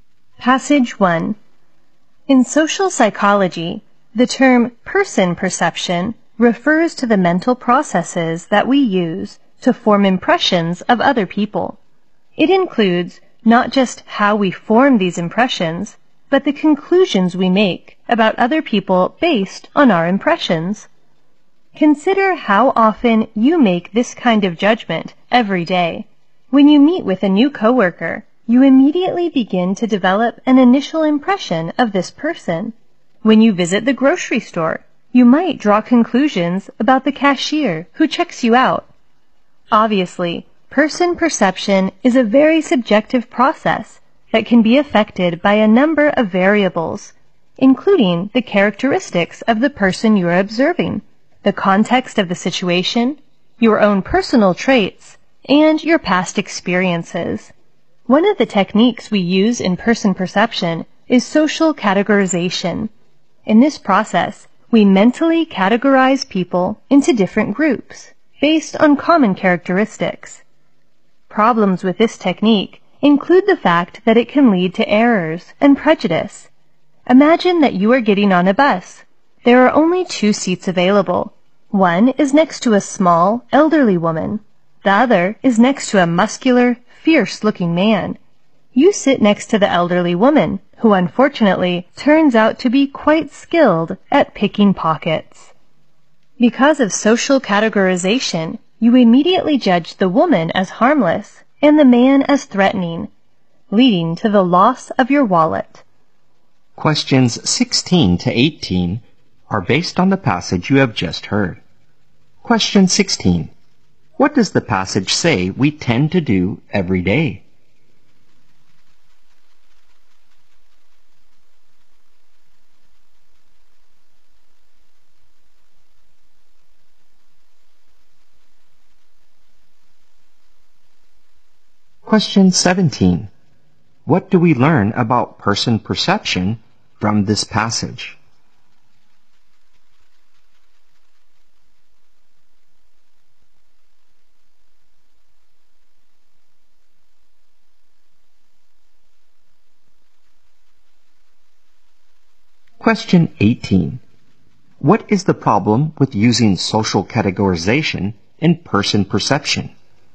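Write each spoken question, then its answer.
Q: What does the passage say we tend to do every day?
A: Form impressions of and judge other people

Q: What is the problem with using social categorization in person perception?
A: It can lead to errors and prejudice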